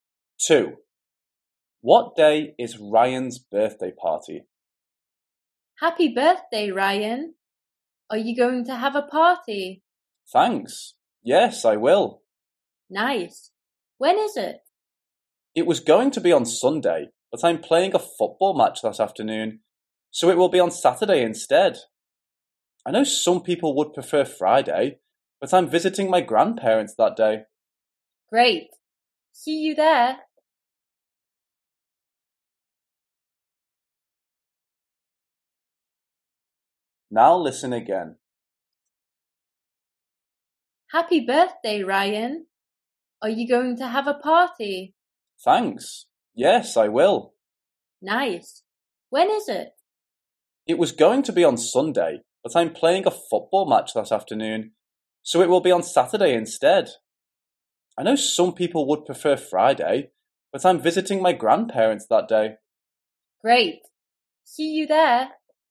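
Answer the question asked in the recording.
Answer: Saturday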